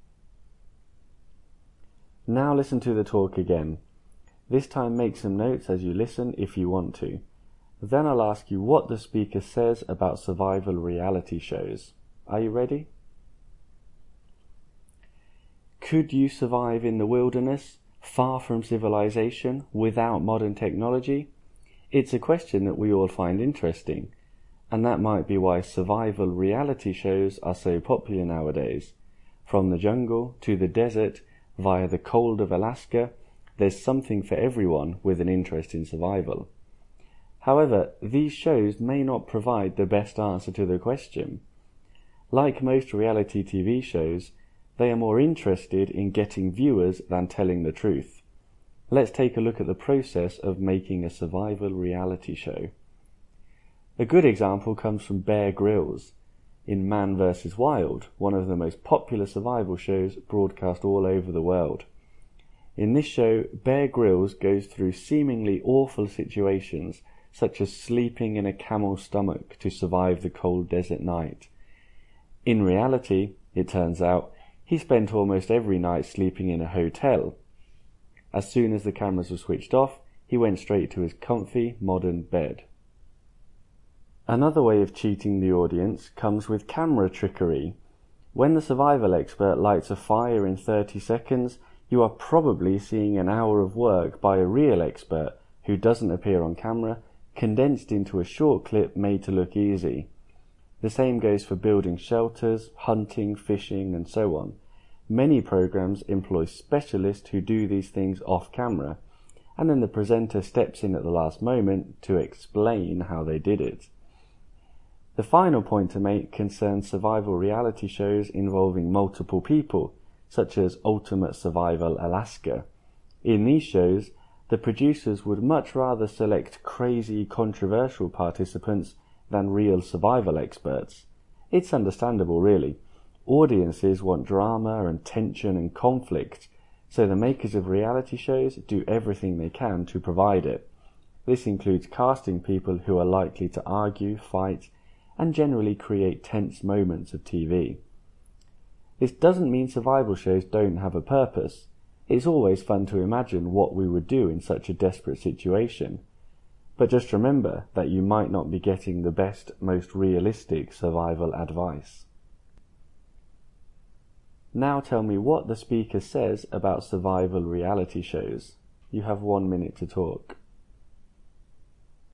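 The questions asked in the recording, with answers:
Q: Now tell me what the speaker says about survival reality shows.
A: They are popular but care more about viewers than truth: Bear Grylls slept in hotels, experts off camera do tasks like lighting fires, and producers cast controversial people for drama; they're fun but don't give realistic survival advice.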